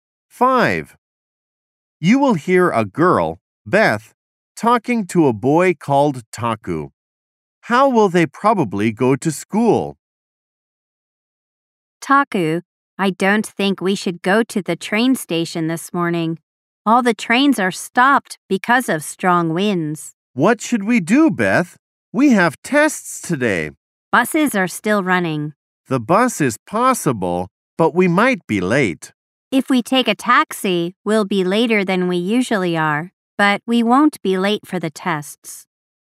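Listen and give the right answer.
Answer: By taxi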